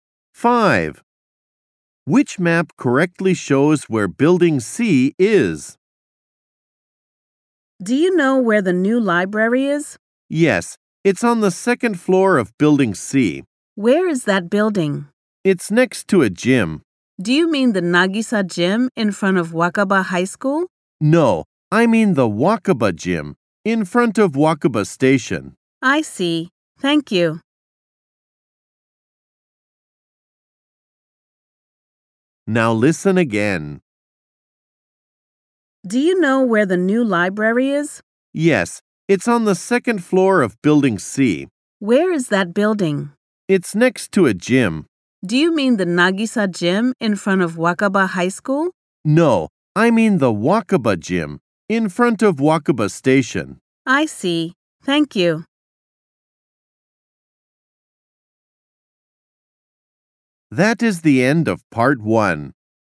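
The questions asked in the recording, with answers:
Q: Which map correctly shows where Building C is?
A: The map showing it next to Wakaba Gym, in front of Wakaba Station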